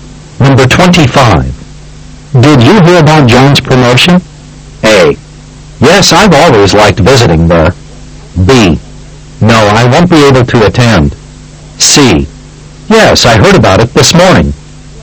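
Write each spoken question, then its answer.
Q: Did you hear about John's promotion?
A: C: Yes, I heard about it this morning.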